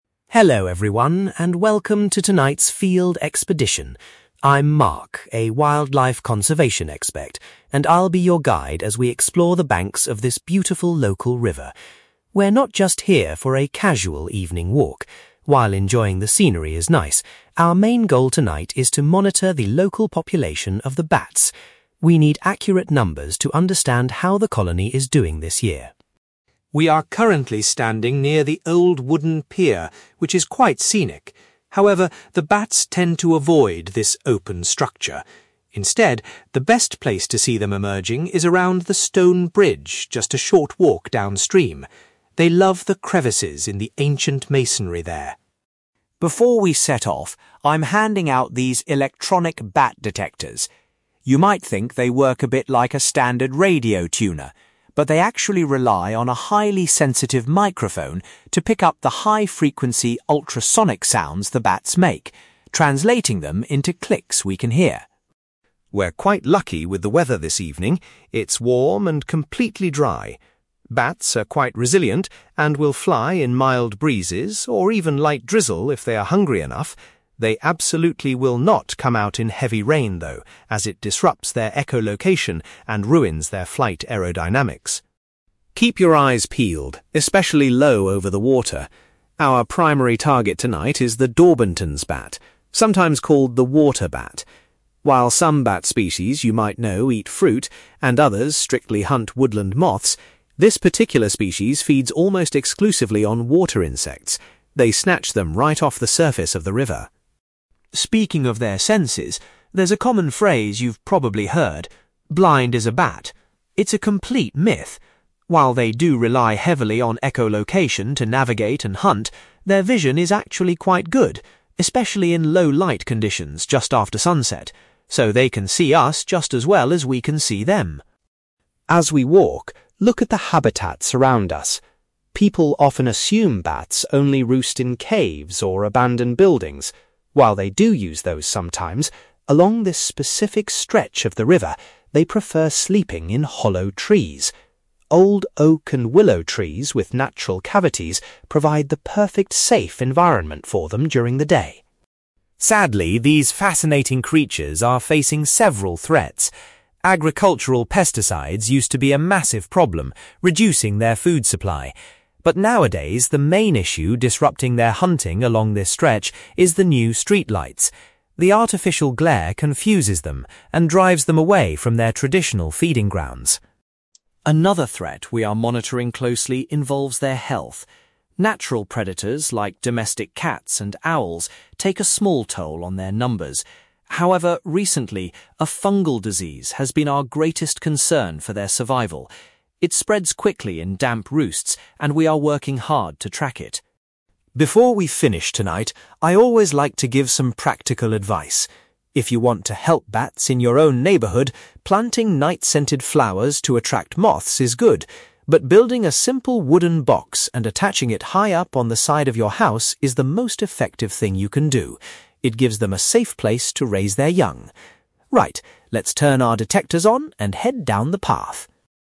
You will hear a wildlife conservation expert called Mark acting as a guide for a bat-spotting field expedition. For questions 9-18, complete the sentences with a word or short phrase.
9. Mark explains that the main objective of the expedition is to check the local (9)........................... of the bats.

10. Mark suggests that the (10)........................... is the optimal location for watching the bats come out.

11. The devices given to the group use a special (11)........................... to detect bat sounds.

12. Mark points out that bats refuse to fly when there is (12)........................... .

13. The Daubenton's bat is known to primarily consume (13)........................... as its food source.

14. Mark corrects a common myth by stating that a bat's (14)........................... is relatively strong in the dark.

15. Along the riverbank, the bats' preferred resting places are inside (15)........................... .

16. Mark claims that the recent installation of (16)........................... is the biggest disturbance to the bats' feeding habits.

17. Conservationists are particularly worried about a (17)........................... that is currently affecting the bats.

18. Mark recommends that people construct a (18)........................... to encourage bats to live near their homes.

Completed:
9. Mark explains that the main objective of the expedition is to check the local population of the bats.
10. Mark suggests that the stone bridge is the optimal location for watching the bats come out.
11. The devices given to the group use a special microphone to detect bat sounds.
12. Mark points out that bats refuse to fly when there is heavy rain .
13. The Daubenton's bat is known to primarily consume water insects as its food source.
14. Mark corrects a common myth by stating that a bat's vision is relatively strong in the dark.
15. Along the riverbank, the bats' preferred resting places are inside hollow trees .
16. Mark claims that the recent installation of street lights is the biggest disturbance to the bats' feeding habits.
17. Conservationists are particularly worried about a disease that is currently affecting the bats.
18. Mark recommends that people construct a wooden box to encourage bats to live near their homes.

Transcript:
Mark: Hello everyone, and welcome to tonight's field expedition. I'm Mark, a wildlife conservation expert, and I'll be your guide as we explore the banks of this beautiful local river. We're not just here for a casual evening walk; while enjoying the scenery is nice, our main goal tonight is to monitor the local population of the bats. We need accurate numbers to understand how the colony is doing this year.
We are currently standing near the old wooden pier, which is quite scenic. However, the bats tend to avoid this open structure. Instead, the best place to see them emerging is around the stone bridge just a short walk downstream. They love the crevices in the ancient masonry there.
Before we set off, I'm handing out these electronic bat detectors. You might think they work a bit like a standard radio tuner, but they actually rely on a highly sensitive microphone to pick up the high-frequency ultrasonic sounds the bats make, translating them into clicks we can hear.
We're quite lucky with the weather this evening. It's warm and completely dry. Bats are quite resilient and will fly in mild breezes or even light drizzle if they are hungry enough. They absolutely will not come out in heavy rain, though, as it disrupts their echolocation and ruins their flight aerodynamics.
Keep your eyes peeled, especially low over the water. Our primary target tonight is the Daubenton's bat, sometimes called the 'water bat'. While some bat species you might know eat fruit, and others strictly hunt woodland moths, this particular species feeds almost exclusively on water insects. They snatch them right off the surface of the river.
Speaking of their senses, there's a common phrase you've probably heard: 'blind as a bat'. It's a complete myth! While they do rely heavily on echolocation to navigate and hunt, their vision is actually quite good, especially in low light conditions just after sunset. So, they can see us just as well as we can see them.
As we walk, look at the habitats around us. People often assume bats only roost in caves or abandoned buildings. While they do use those sometimes, along this specific stretch of the river, they prefer sleeping in hollow trees. Old oak and willow trees with natural cavities provide the perfect, safe environment for them during the day.
Sadly, these fascinating creatures are facing several threats. Agricultural pesticides used to be a massive problem, reducing their food supply. But nowadays, the main issue disrupting their hunting along this stretch is the new street lights. The artificial glare confuses them and drives them away from their traditional feeding grounds.
Another threat we are monitoring closely involves their health. Natural predators like domestic cats and owls take a small toll on their numbers. However, recently, a fungal disease has been our greatest concern for their survival. It spreads quickly in damp roosts and we are working hard to track it.
Before we finish tonight, I always like to give some practical advice. If you want to help bats in your own neighborhood, planting night-scented flowers to attract moths is good. But building a simple wooden box and attaching it high up on the side of your house is the most effective thing you can do. It gives them a safe place to raise their young. Right, let's turn our detectors on and head down the path!

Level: B2